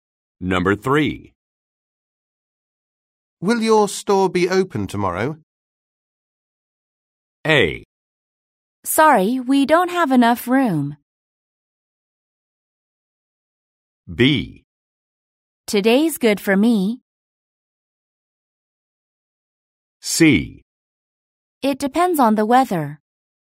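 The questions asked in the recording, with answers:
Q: Will your store be open tomorrow?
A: C: It depends on the weather.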